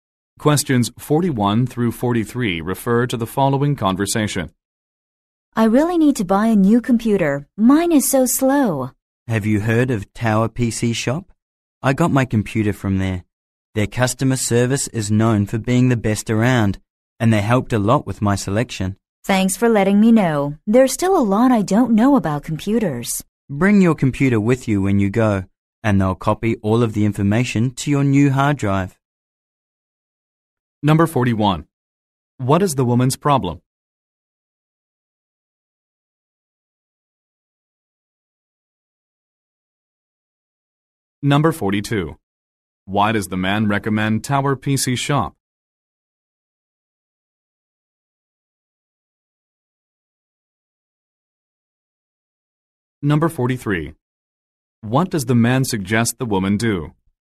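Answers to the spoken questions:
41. Her computer is too slow
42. Its customer service is the best around
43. Bring her computer to the shop so they can copy her information to the new drive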